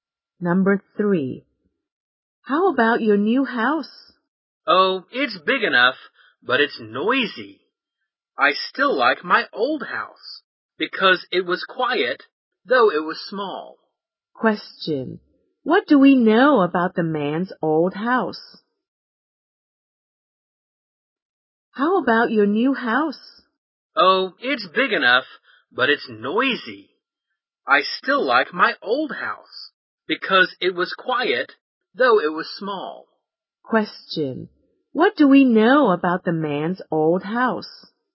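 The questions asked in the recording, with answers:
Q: What do we know about the man's old house?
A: It was quiet but small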